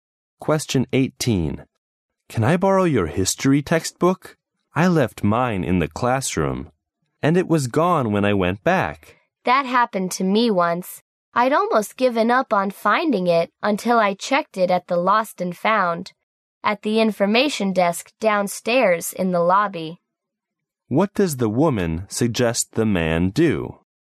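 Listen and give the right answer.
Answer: Check the Lost and Found at the information desk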